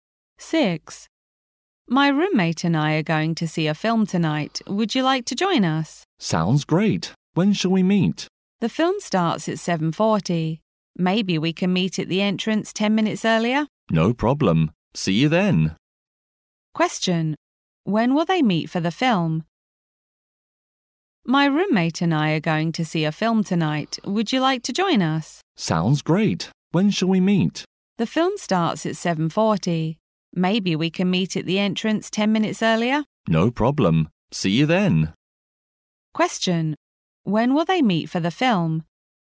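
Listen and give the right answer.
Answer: At 7:30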